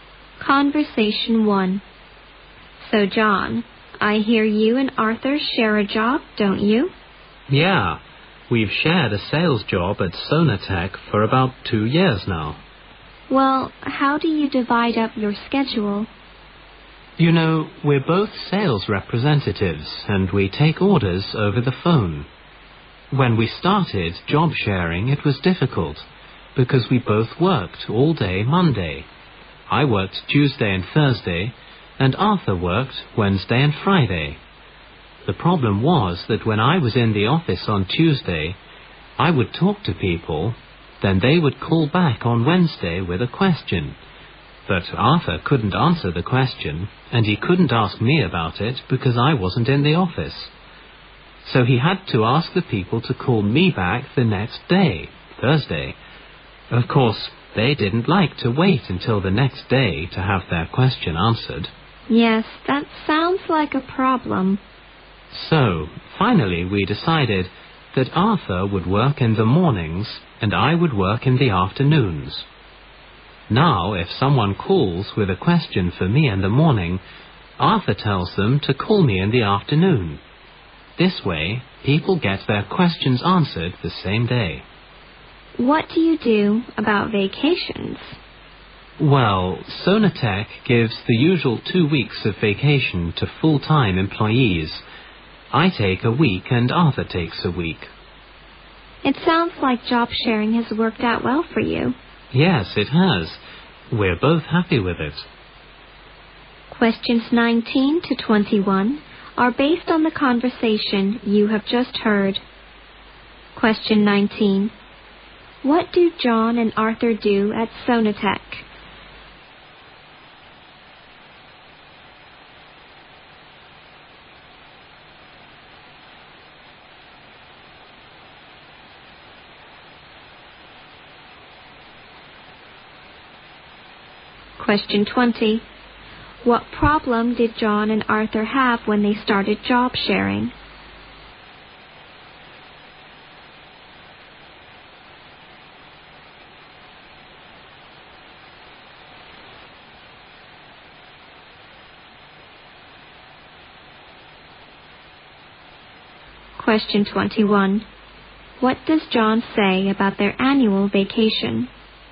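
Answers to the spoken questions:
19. They are sales representatives who take orders over the phone
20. Customers had to wait until the next day to get their questions answered
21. They split the two weeks, each taking one week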